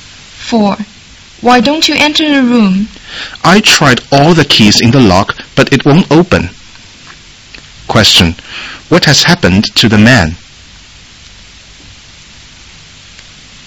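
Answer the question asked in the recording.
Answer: He can't open the door with any of his keys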